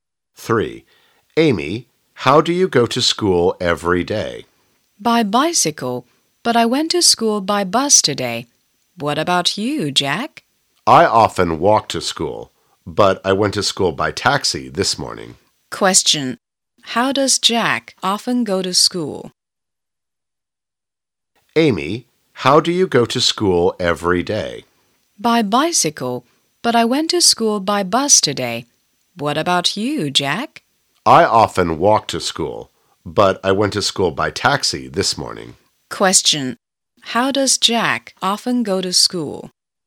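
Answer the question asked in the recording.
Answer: He walks to school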